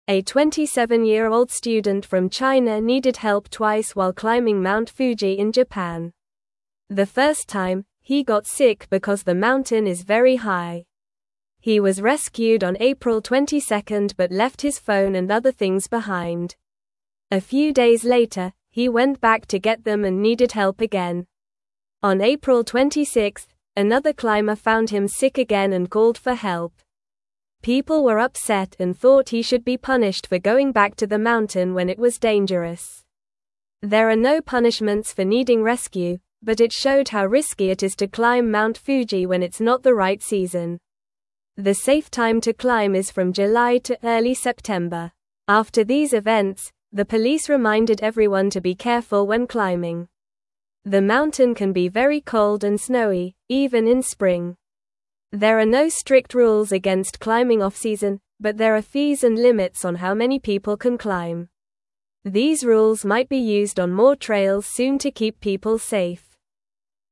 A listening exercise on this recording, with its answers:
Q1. How old was the student from China who climbed Mount Fuji?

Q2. What happened to the student the first time he needed help on the mountain?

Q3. When did the student go back to the mountain to get his things?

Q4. Who found the student sick the second time he needed help?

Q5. Why were people upset about the student's actions on the mountain?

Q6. When is the safest time to climb Mount Fuji?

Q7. What did the police remind everyone to do after these events?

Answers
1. He was 27 years old.
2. He got sick because the mountain is very high.
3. He went back on April 26.
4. Another climber found him sick.
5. They thought he should not have gone back when it was dangerous.
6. The safest time is from July to early September.
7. The police reminded everyone to be careful when climbing.

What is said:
A 27-year-old student from China needed help twice while climbing Mount Fuji in Japan. The first time, he got sick because the mountain is very high. He was rescued on April 22 but left his phone and other things behind. A few days later, he went back to get them and needed help again.
On April 26, another climber found him sick again and called for help. People were upset and thought he should be punished for going back to the mountain when it was dangerous. There are no punishments for needing rescue, but it showed how risky it is to climb Mount Fuji when it's not the right season. The safe time to climb is from July to early September.
After these events, the police reminded everyone to be careful when climbing. The mountain can be very cold and snowy, even in spring. There are no strict rules against climbing off-season, but there are fees and limits on how many people can climb. These rules might be used on more trails soon to keep people safe.

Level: Level 2